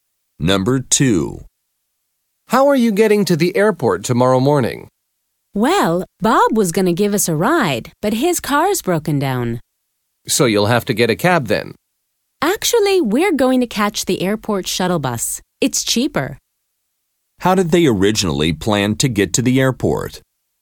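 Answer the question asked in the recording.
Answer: Bob was going to give them a ride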